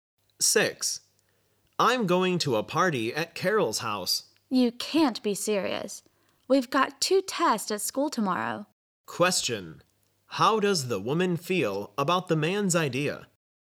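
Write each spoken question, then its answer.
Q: How does the woman feel about the man's idea?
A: She disapproves of it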